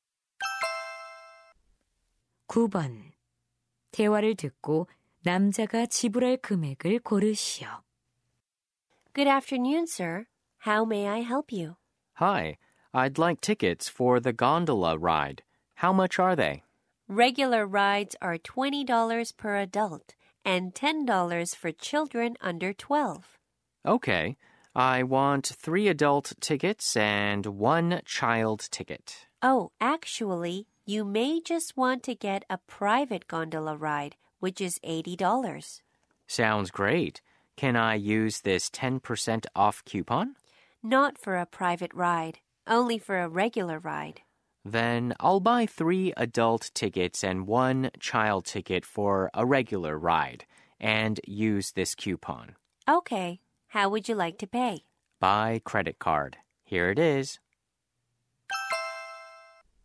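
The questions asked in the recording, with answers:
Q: 대화를 듣고 남자가 지불할 금액을 고르시오.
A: 63달러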